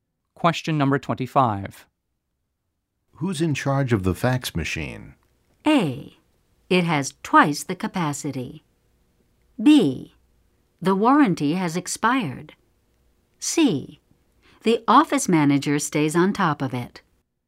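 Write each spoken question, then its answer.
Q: Who's in charge of the fax machine?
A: C: The office manager stays on top of it.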